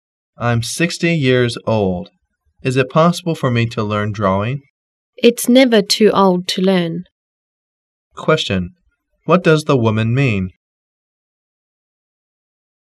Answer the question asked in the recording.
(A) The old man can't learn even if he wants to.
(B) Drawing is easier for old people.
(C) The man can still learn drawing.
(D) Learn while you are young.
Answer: (C) The man can still learn drawing.

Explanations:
M: I'm 60 years old. Is it possible for me to learn drawing? W: It's never too old to learn. Q: What does the woman mean?